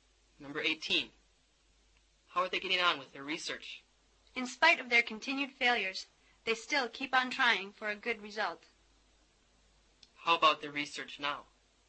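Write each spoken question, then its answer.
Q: How about their research now?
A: They still haven't succeeded but keep trying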